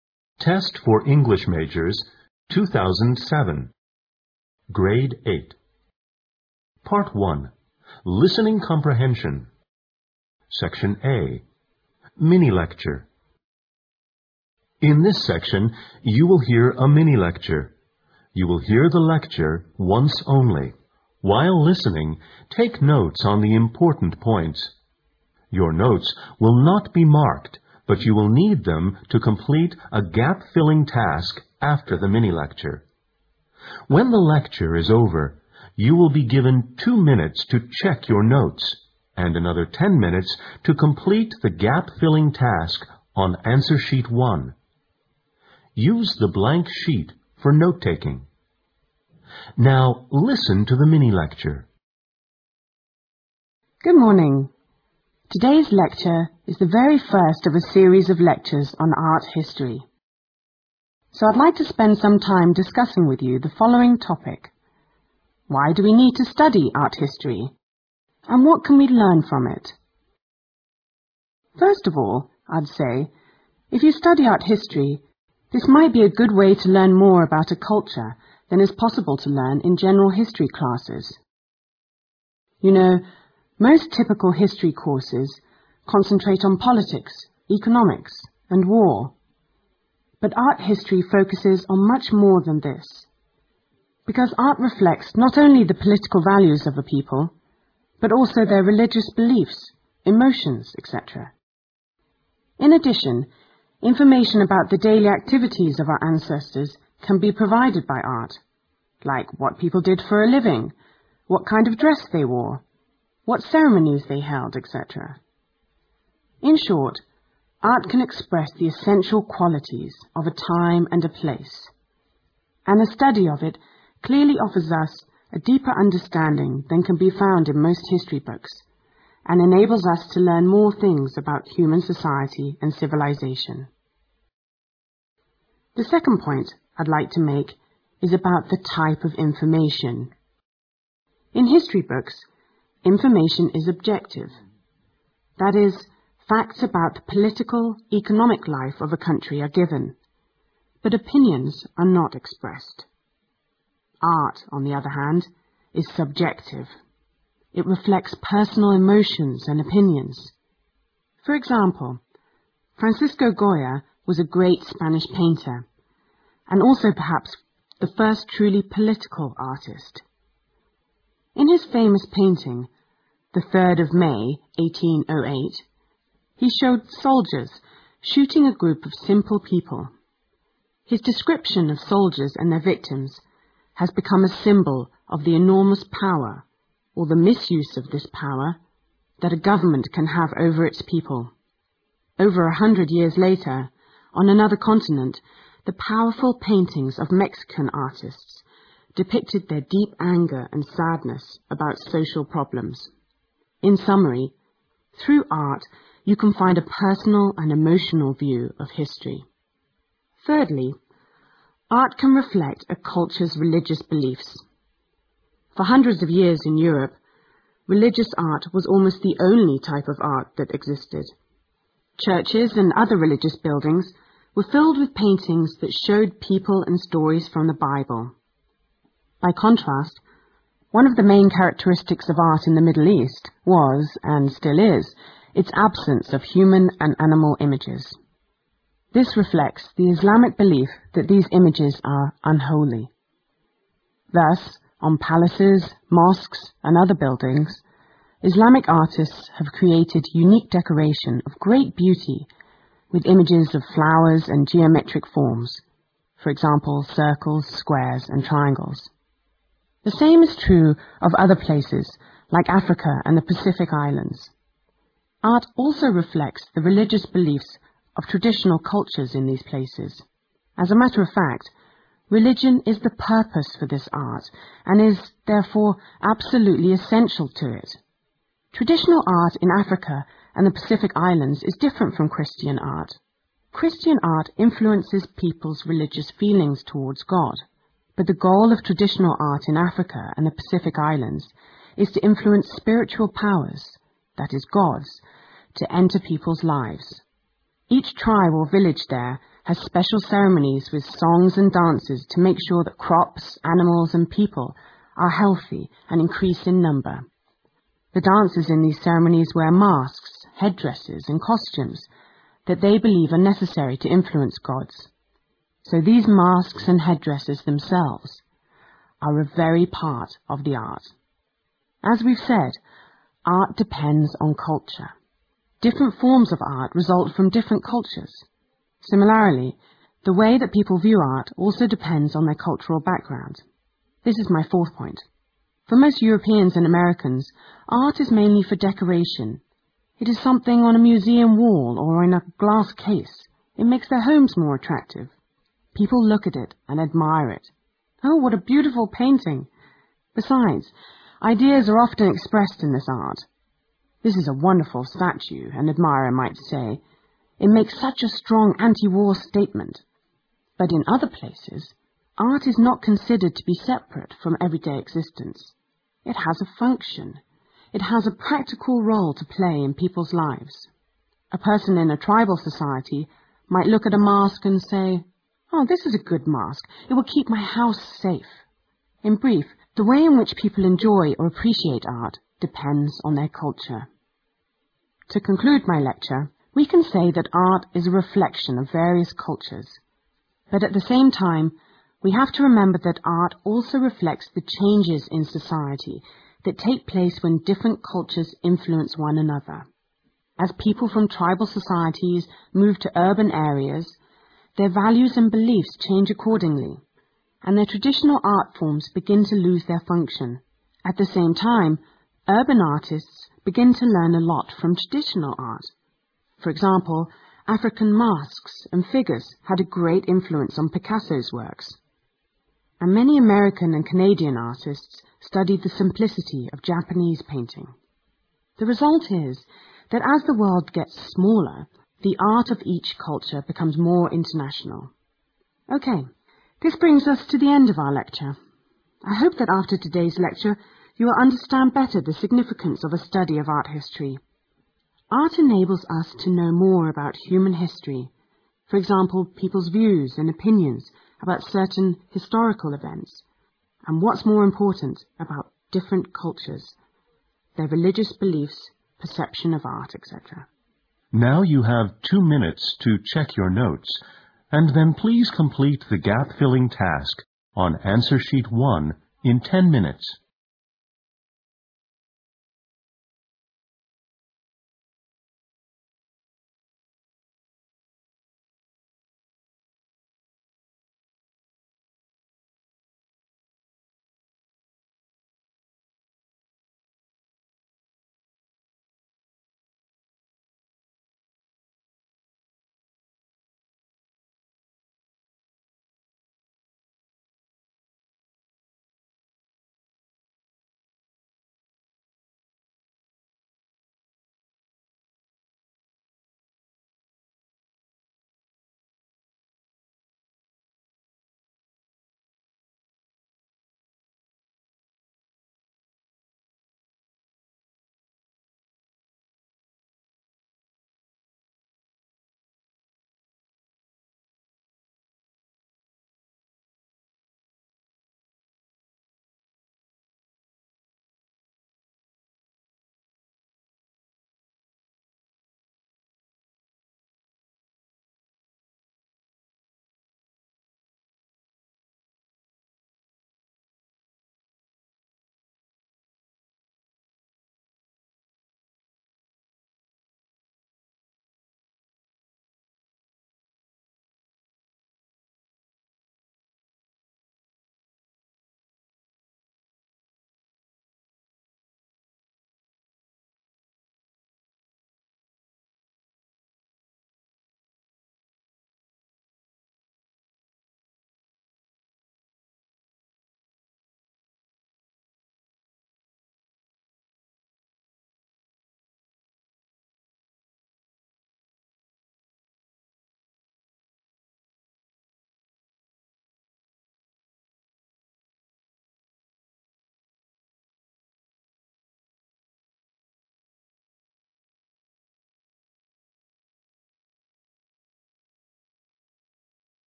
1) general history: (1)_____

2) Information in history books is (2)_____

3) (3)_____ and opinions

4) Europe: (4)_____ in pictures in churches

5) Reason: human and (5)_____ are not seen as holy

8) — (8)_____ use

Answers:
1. politics, economics and war
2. objective
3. personal emotions
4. people and stories from the Bible
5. animal image
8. practical use

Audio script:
Part 1, Listening Comprehension
SECTION A MINI-LECTURE
Good morning. Today's lecture is the very first of a series of lectures on the art history. So I'd like to spend some time discussing with you the following topic: why do we need to study art history and what can we learn from it.
First of all, I'd say, if you study art history, it might be a good way to learn more about a cul?ture than it's possible to learn iri general history classes. You know, most typical history courses con?centrate on politics, economies and war. ( Q1) But art history focuses on much more than this, be?cause art reflects not only the political values of the people , but also their religious beliefs , emotions etc. In addition, information about the daily activities of our ancestors can be provided by art, like what people did for a living, what kind of dress they wore, what ceremonies they held etc. In short, art can express the essential qualities of a time and a place and the study of it clearly offers us a dee?per understanding than what can be found in most history books and enables us to learn more things about human society and civilization.
The second point, I'd like to make, is about the type of information. In history books, informa?tion is objective. ( Q2) That is, facts about the political, economic life of a country are given, but the opinions are not expressed. Art, on the other hand, is subjective. It reflects personal emotions and opinions. ( Q3) For example, Francisco Goya was a great Spanish paintIr, and also perhaps the first truly political artist. In his famous painting, the 3rd of May, 1808, he showed soldiers shooting a group of simple people. His description of soldiers and their victims has become a symbol of the enormous power or the misuse of this power that a government can have over its people. Over a hun?dred years later, on another continent, the powerful paintings of Mexican artists depicted their deep anger and sadness about social problems. In summary, through art you can find a personal and emo?tional view of history.
Thirdly, art can reflect a culture's religious beliefs. For hundreds of years in Europe, religious art was almost the only type of art that existed. Churches and other religious buildings were filled with paintings that showed people and stories from the Bible. ( Q4) By contrast, one of the main charac?teristics of the art in the Mid-East was and still is its absence of human and animal images. This re?flects the Islamic belief that these images are unholy. ( Q5 ) Thus, on palaces, mosques and other buildings, Islamic artists have created unique decoration of great beauty with images of flowers and geometric forms, for example, circles, squares and triangles. The same is true of other places, like Africa and the Pacific islands. Art also reflects the religious beliefs of traditional cultures in these places. As a matter of fact, religion is the purpose for this art and is, therefore, absolutely essential to it. Traditional art in Africa and the Pacific Islands is different from Christian art. Christian art in?fluences people's religious feelings towards God. But the goal of traditional art in Africa and the Pacific islands is the influence of spiritual power, that is gods to enter people's lives. Each tribe or village there has special ceremonies with songs and dances to make sure that crops, animals and peo?ple are healthy and in increasing number. ( Q6) The dancers in the ceremonies wear masks , head?dresses and costumes that they believe are necessary to influence gods. So these masks and head?dresses themselves are a very part of the art.
As we've said, art depends on culture. Different forms of art result from different cultures. Simi?larly, the way that people view art also depends on their cultural background. This is my fourth point. For most Europeans and Americans, art is mainly for decoration. ( Q7 ) It is something on a museum wall or in a glass case. It makes their homes more attractive. People look at it and admire it. " Oh , what a beautiful painting. " Besides, ideas are often expressed in this art. "This is a won?derful statue" , an admirer might say , " it makes such a strong anti-war statement. " But in other places, art is not considered to be separate from everyday existence. It has a function. It has a prac?tical role to play in people's lives. ( Q8) A person in a tribal society might look at a mask and say, " Oh , this is a good mask. It will keep my house safe. " In brief, the way in which people enjoy or appreciate art depends on their culture.
To conclude my lecture , we can say that art is a reflection of various cultures. ( Q9 ) But at the same time, we have to remember that the art also reflects the changes in society that take place when different cultures influence one another. As people from tribal societies move to urban areas , their values and beliefs change accordingly and their traditional art forms begin to loose their function. ( Q10) At the same time , urban artists begin to learn a lot from traditional art. For example , African masks and figures had a great influence on Picasso's works. And many American and Canadian artists study the simplicity,of Japanese painting. The result is, that as the world gets smaller, the art of each culture becomes more international. OK, this brings us to the end of our lecture. I hope that after today's lecture, you'll understand better the significance of the study of art history. Art enables us?to know more about human history, for example, people's views and opinions about certain historical events, and what's more important , about different cultures , their religious beliefs , perception of art , etc.